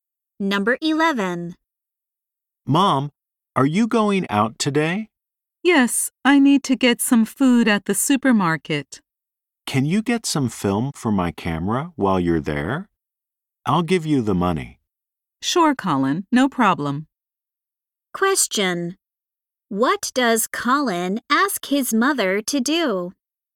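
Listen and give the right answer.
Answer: Buy film for his camera.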